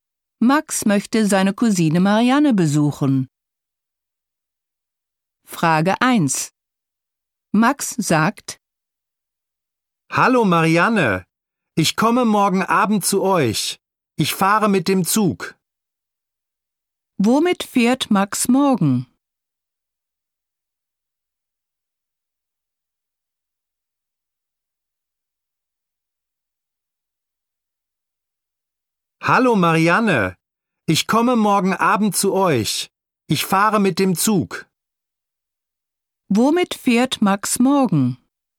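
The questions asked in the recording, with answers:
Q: Womit fährt Max morgen?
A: Mit dem Zug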